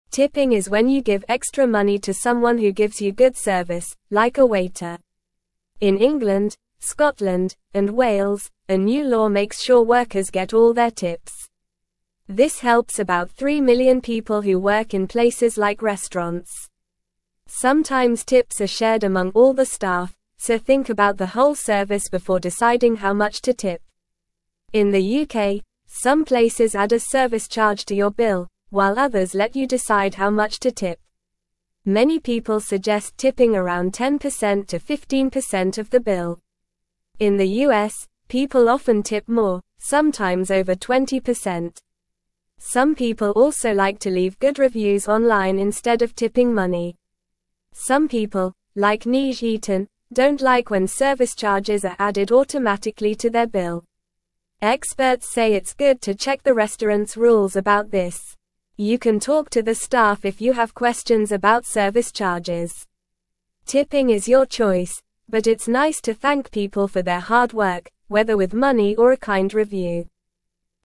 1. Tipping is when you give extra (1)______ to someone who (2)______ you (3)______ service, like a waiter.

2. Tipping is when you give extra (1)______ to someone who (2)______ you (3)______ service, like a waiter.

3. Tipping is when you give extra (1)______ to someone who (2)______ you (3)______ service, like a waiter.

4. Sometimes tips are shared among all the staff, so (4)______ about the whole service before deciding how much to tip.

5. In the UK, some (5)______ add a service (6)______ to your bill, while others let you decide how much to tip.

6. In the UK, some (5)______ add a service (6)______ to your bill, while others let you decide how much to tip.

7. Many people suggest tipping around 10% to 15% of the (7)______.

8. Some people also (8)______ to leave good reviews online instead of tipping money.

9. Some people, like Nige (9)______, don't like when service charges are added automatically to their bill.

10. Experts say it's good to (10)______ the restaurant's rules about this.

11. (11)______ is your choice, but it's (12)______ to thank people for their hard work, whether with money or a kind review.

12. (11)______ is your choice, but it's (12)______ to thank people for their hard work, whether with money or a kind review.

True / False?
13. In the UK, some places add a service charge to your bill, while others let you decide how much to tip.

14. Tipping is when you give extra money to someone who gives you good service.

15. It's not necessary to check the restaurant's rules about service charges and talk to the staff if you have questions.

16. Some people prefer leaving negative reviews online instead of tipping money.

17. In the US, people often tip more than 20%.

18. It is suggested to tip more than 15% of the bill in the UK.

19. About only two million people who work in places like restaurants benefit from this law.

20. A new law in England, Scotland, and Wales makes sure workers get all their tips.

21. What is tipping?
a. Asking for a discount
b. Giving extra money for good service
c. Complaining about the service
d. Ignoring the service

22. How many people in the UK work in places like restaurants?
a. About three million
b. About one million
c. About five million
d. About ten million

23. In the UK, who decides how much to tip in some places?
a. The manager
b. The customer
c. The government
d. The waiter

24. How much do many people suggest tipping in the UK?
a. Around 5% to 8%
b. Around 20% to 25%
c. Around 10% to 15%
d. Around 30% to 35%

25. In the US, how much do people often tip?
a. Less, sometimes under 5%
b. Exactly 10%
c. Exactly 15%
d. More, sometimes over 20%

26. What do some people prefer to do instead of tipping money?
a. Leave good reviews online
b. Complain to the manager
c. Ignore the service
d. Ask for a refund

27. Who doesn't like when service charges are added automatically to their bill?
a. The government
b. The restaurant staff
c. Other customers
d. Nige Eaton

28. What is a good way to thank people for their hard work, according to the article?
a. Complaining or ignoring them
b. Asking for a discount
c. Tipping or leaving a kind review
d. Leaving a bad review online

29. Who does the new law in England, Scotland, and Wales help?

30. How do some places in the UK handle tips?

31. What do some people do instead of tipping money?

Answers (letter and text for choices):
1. money
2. gives
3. good
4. think
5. places
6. charge
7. bill
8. like
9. Eaton
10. check
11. Tipping
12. nice
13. True
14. True
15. False
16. False
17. True
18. False
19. False
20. True
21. b. Giving extra money for good service
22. a. About three million
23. b. The customer
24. c. Around 10% to 15%
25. d. More, sometimes over 20%
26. a. Leave good reviews online
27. d. Nige Eaton
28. c. Tipping or leaving a kind review
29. The new law helps about three million people who work in places like restaurants.
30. Some places add a service charge to your bill, while others let you decide how much to tip.
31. Some people like to leave good reviews online instead of tipping money.

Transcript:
Tipping is when you give extra money to someone who gives you good service, like a waiter. In England, Scotland, and Wales, a new law makes sure workers get all their tips. This helps about three million people who work in places like restaurants. Sometimes tips are shared among all the staff, so think about the whole service before deciding how much to tip.
Many people suggest tipping around 10% to 15% of the bill. In the US, people often tip more, sometimes over 20%. Some people also like to leave good reviews online instead of tipping money.
Some people, like Nige Eaton, don't like when service charges are added automatically to their bill. Experts say it's good to check the restaurant's rules about this. You can talk to the staff if you have questions about service charges. Tipping is your choice, but it's nice to thank people for their hard work, whether with money or a kind review.

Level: Level 2